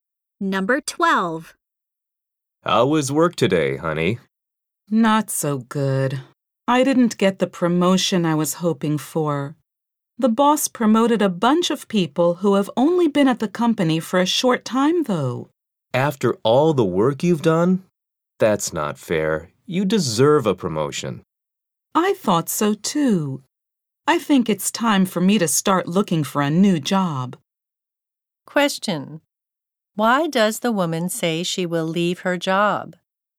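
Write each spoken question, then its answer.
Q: Why does the woman say she will leave her job?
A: She did not get the promotion she wanted.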